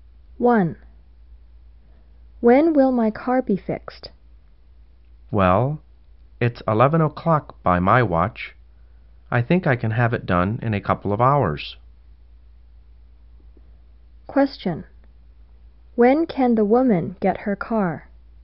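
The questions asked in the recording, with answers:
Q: Question. When can the woman get her car?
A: At about 1 o'clock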